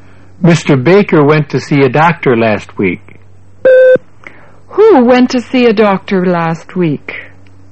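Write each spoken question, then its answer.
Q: Who went to see a doctor last week?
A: Mr. Baker.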